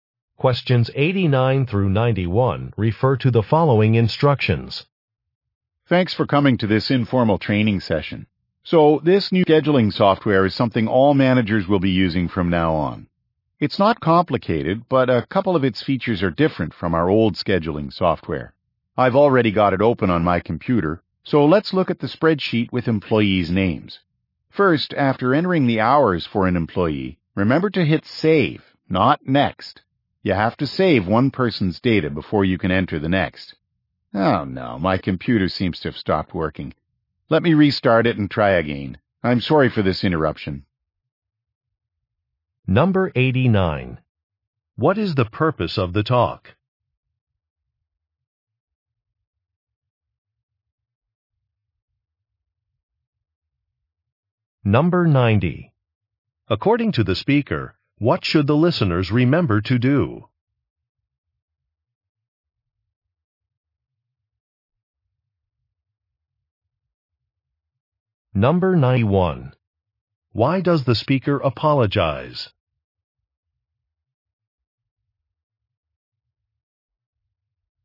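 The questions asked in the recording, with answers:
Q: What is the purpose of the talk?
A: To train managers on new scheduling software

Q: According to the speaker, what should the listeners remember to do?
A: Hit Save, not Next

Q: Why does the speaker apologize?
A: His computer stopped working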